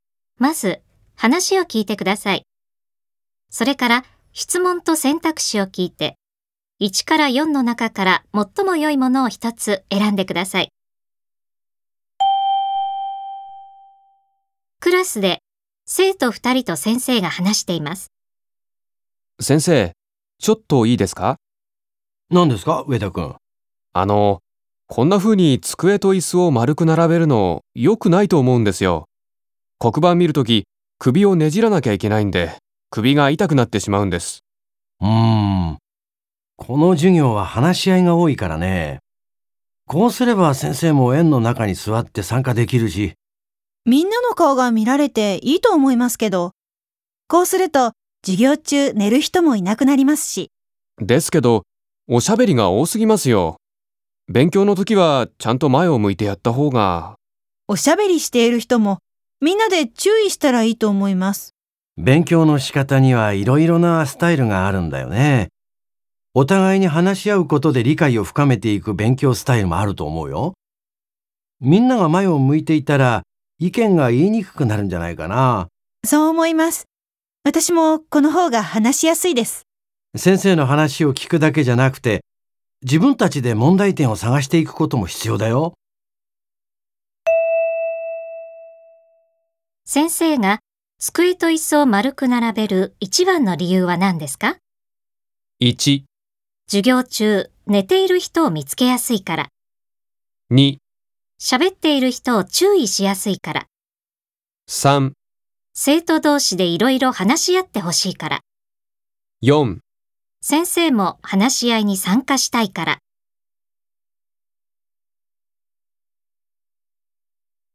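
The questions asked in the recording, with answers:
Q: 先生が机と椅子を丸く並べる一番の理由は何ですか?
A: 3: 生徒同士でいろいろ話し合ってほしいから。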